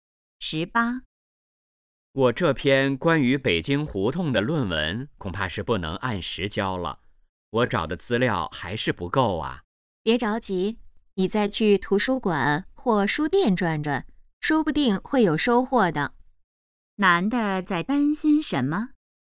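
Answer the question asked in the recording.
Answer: 论文不能按时交(资料不够)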